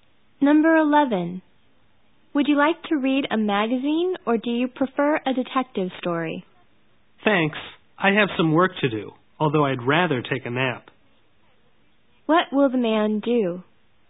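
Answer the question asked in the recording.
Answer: Do some work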